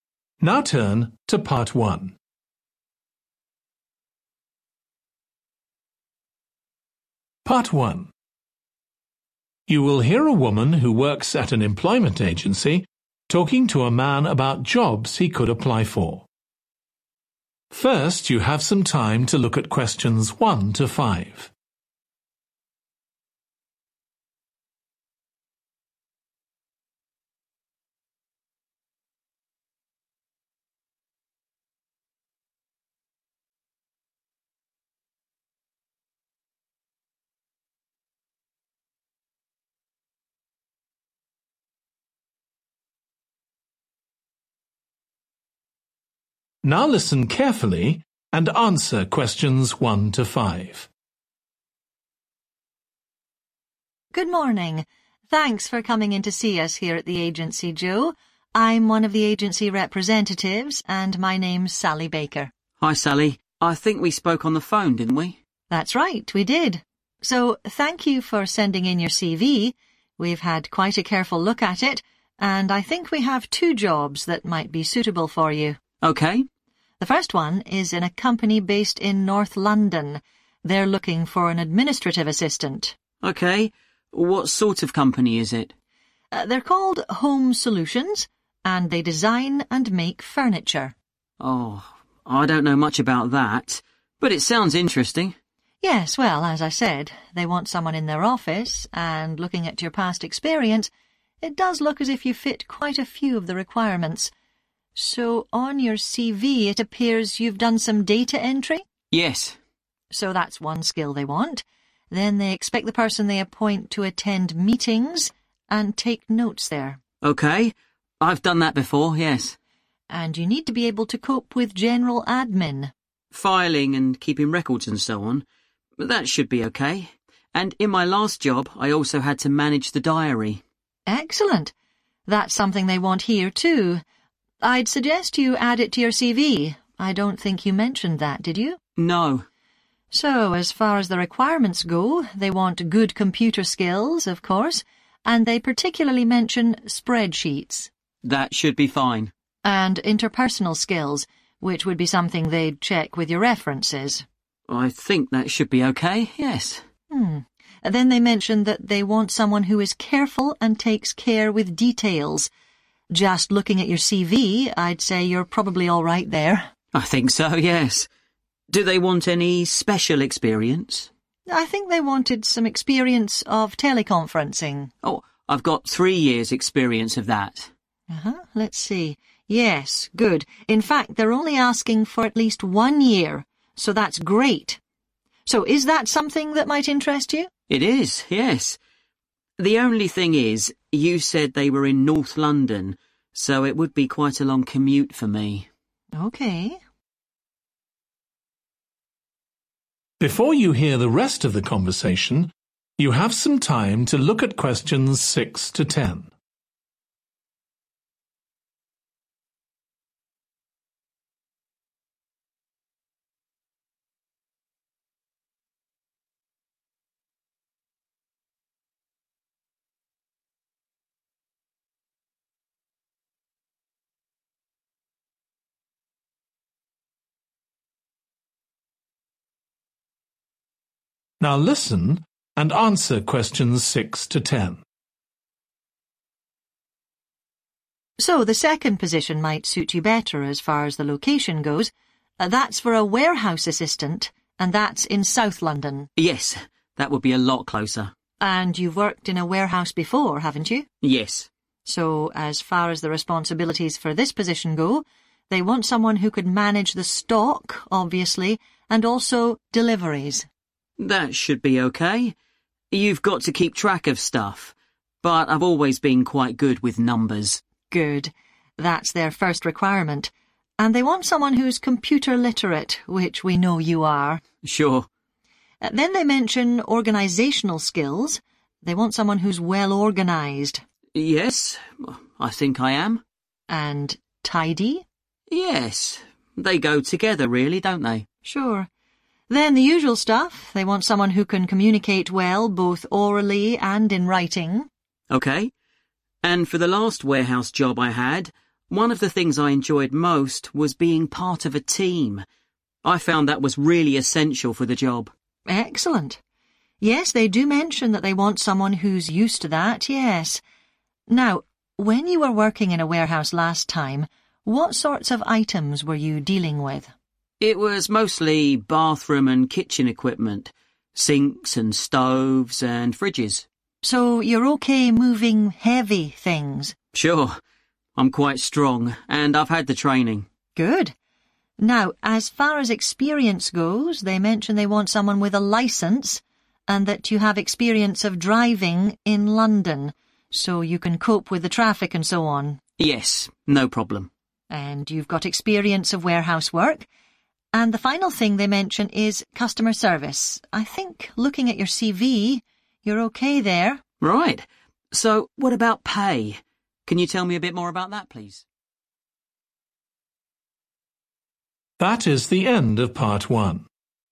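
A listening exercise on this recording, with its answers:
Complete the notes below. Write ONE WORD AND/ OR A NUMBER for each answer.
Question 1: Administrative assistant in a company that produces (1) (North London)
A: furniture

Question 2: Go to (2) and take notes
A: meetings

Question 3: Management of (3)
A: diary

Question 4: Attention to (4)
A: detail

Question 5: Need a minimum of (5) of experience of teleconferencing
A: 1 year

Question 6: Managing (6)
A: deliveries

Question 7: Very organized and (7)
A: tidy

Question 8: Used to working in a (8)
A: team

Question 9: Able to cope with items that are (9)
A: heavy

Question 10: (10) service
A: customer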